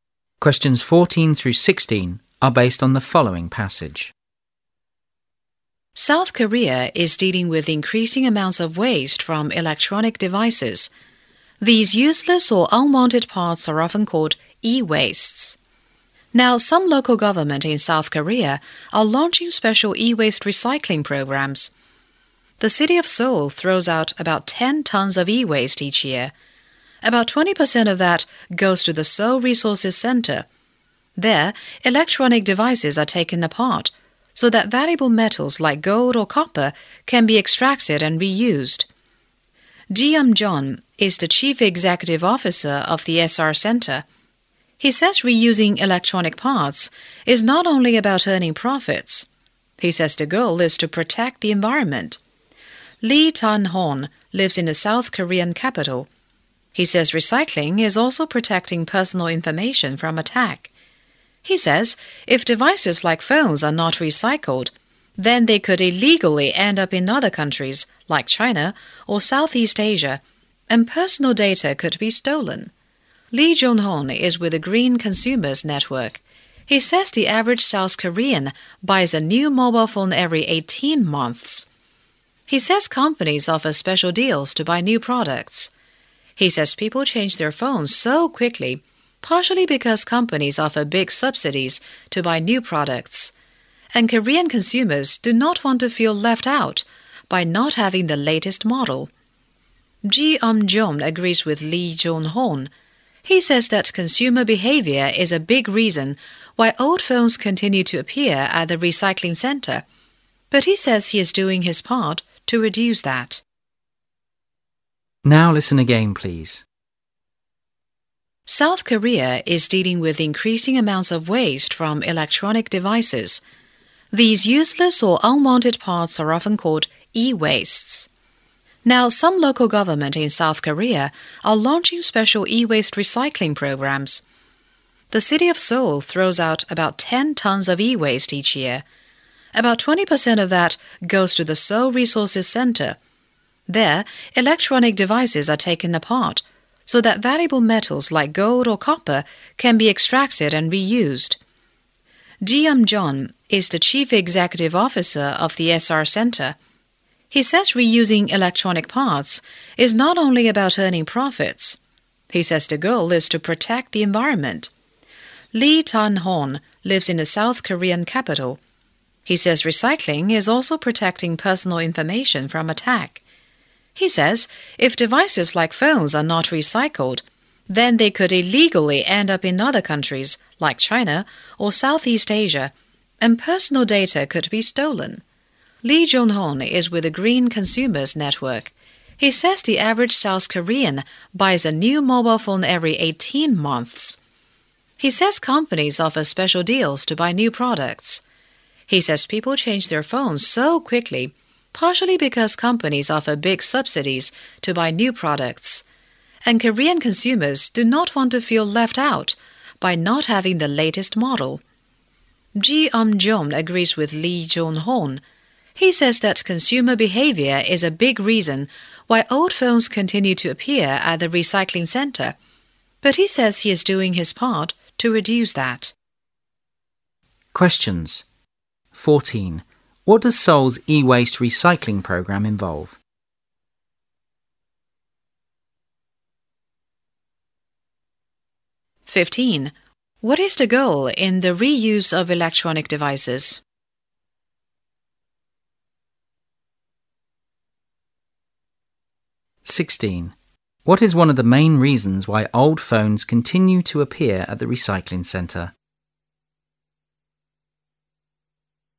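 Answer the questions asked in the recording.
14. Taking devices apart to extract and reuse valuable metals like gold and copper
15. To protect the environment
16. Consumer behavior: people change phones quickly due to company subsidies and wanting the latest model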